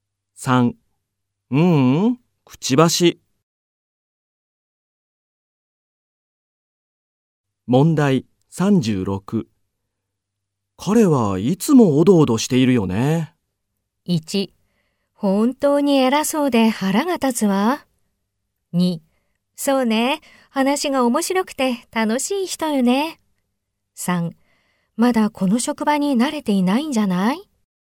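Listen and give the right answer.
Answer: 3: まだこの職場に慣れていないんじゃない?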